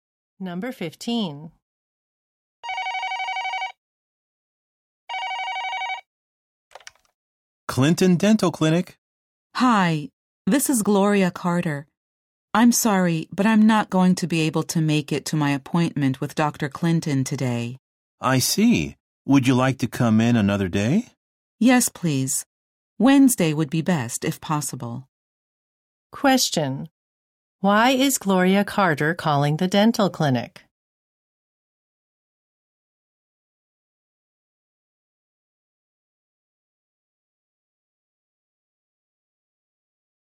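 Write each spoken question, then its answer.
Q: Why is Gloria Carter calling the dental clinic?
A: To change her appointment to another day.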